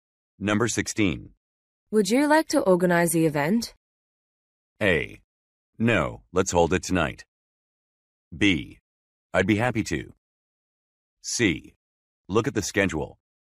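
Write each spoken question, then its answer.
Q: Would you like to organize the event?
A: B: I'd be happy to.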